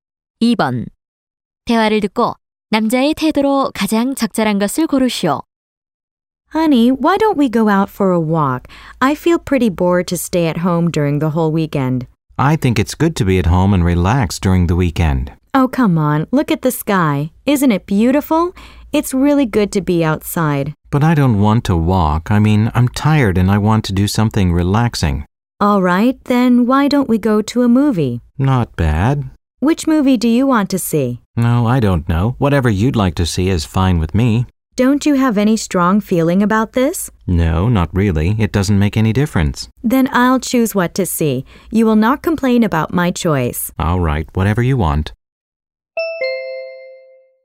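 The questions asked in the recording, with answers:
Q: 대화를 듣고 남자의 태도로 가장 적절한 것을 고르시오.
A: 무관심함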